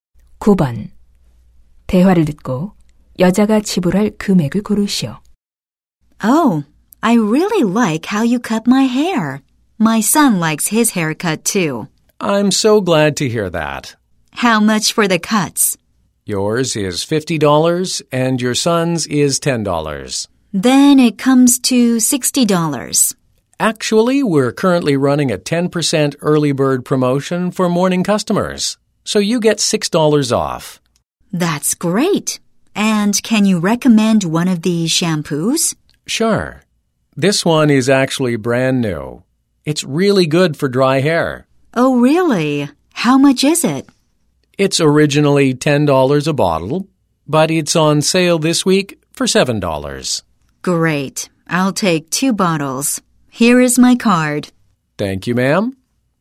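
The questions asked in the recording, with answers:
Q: 대화를 듣고 여자가 지불할 금액을 고르시오.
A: $68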